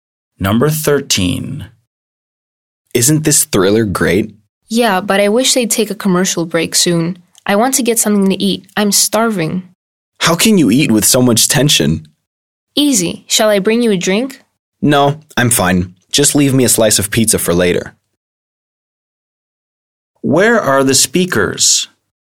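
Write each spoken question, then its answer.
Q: Where are the speakers?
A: At home watching a thriller on TV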